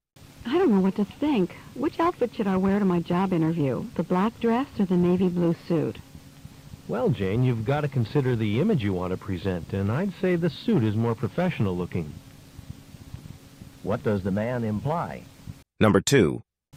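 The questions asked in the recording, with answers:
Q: What does the man imply?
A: Jane should wear the navy blue suit.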